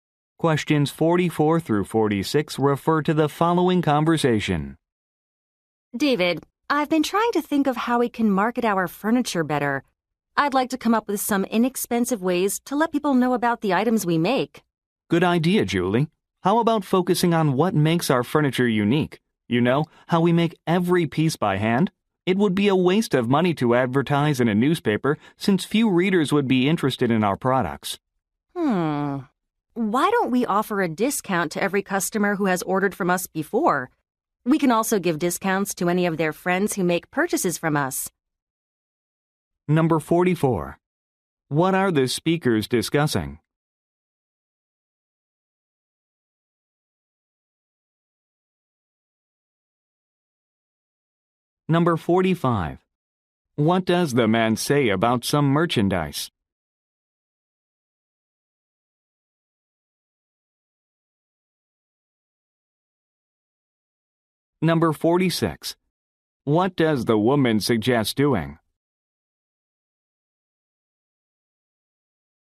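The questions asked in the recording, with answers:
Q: What are the speakers discussing?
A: Inexpensive ways to market their furniture.

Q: What does the man say about some merchandise?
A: Every piece is made by hand.

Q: What does the woman suggest doing?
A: Offering discounts to previous customers and their friends.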